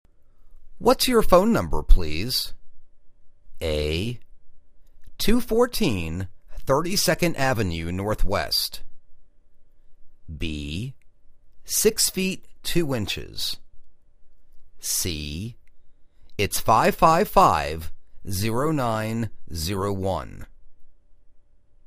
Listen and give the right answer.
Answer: It's 555-0901